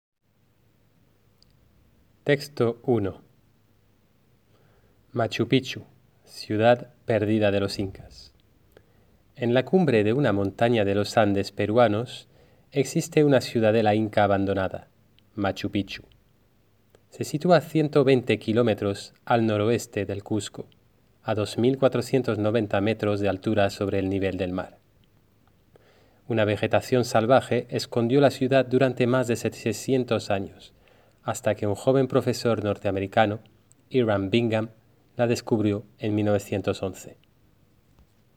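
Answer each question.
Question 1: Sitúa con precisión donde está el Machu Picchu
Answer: En la cumbre de una montaña de los Andes peruanos, a 120 km al noroeste del Cusco, a 2.490 metros de altura

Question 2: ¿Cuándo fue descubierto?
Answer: En 1911

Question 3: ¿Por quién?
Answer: Por Hiram Bingham, un joven profesor norteamericano

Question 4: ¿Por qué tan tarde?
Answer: Porque una vegetación salvaje escondió la ciudad durante más de 700 años

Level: Classe de 3ème classique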